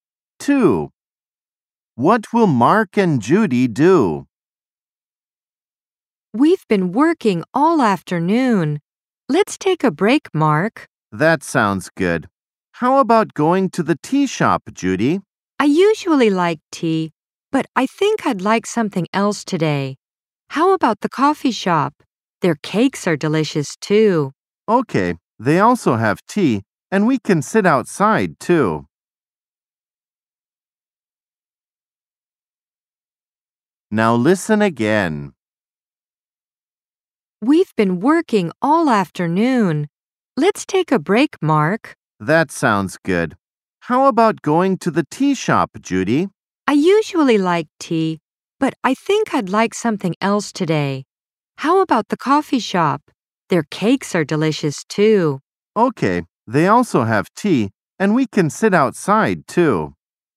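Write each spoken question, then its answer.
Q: What will Mark and Judy do?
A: Go to the coffee shop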